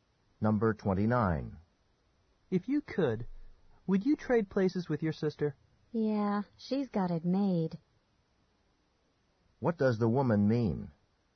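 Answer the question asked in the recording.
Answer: Her sister has an easy, fortunate life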